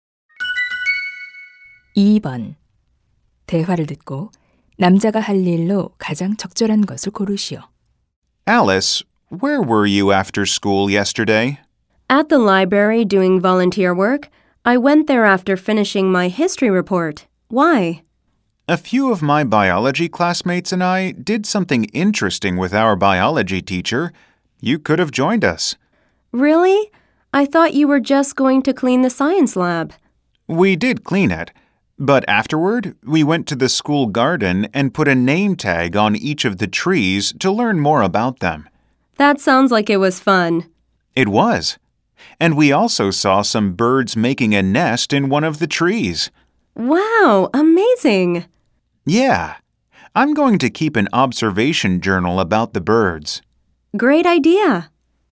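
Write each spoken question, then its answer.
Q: 대화를 듣고 남자가 할 일로 가장 적절한 것을 고르시오.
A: 새 관찰 일지 쓰기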